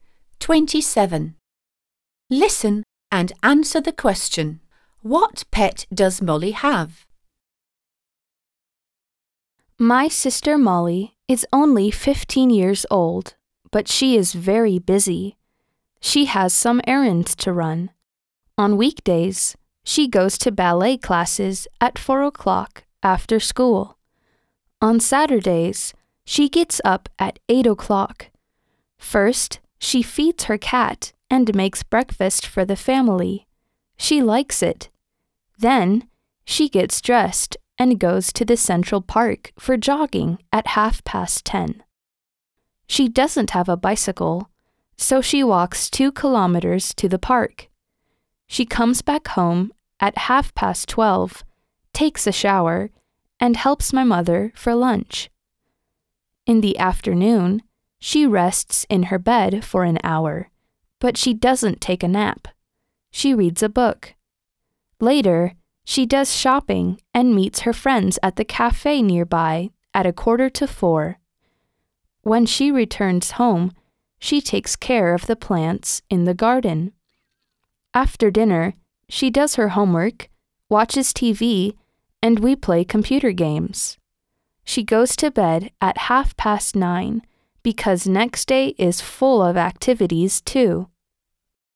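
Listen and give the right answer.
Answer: A cat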